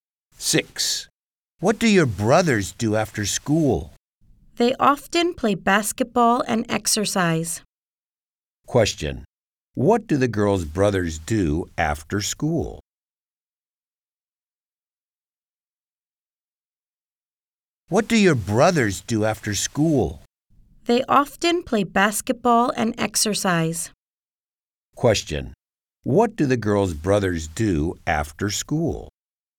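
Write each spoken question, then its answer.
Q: What do the girls' brothers do after school?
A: They play basketball and exercise.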